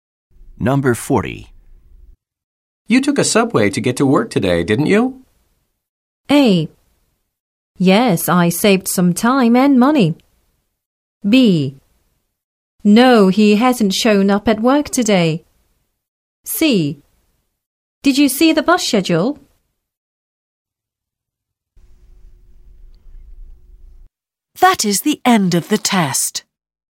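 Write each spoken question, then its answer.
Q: You took a subway to get to work today, didn't you?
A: A: Yes, I saved some time and money.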